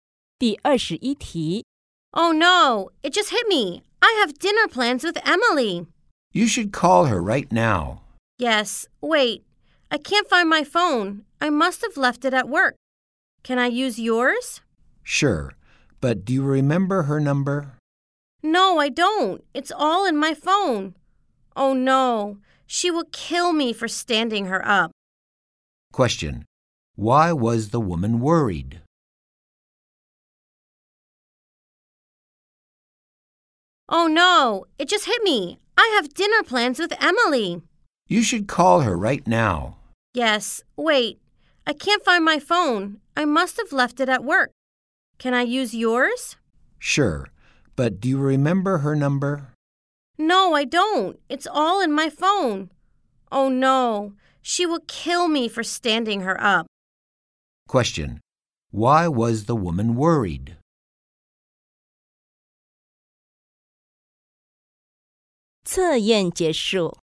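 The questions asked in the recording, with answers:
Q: Why was the woman worried?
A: She had forgotten her dinner plans with Emily and couldn't call her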